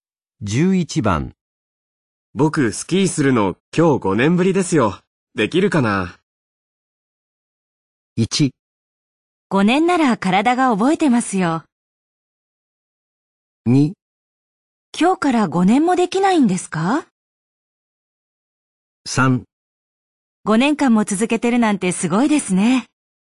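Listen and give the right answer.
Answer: 1: 5年なら体が覚えてますよ。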